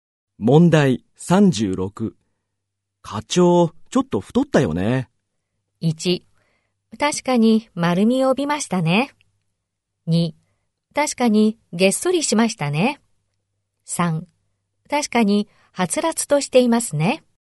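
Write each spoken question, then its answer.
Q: 課長、ちょっと太ったよね。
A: 1: 確かに丸みを帯びましたね。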